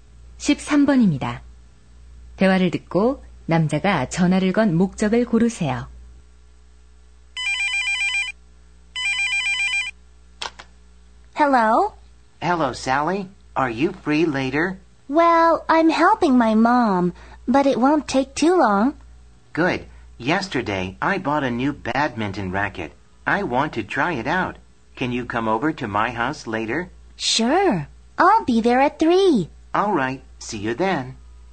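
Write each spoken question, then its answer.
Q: 대화를 듣고 남자가 전화를 건 목적을 고르세요.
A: 집에 와서 새 배드민턴 라켓을 함께 쳐 보자고 초대하려고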